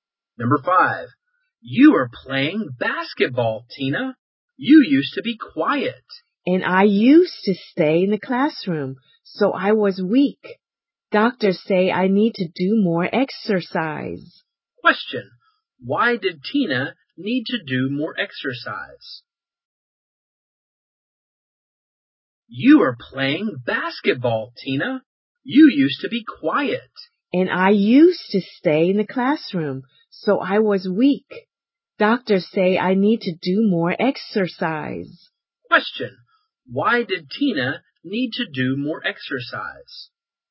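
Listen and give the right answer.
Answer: Because she was weak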